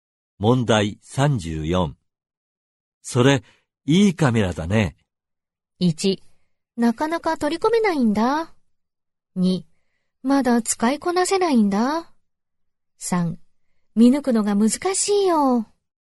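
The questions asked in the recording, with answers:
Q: それ、いいカメラだね。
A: 2: まだ使いこなせないんだ。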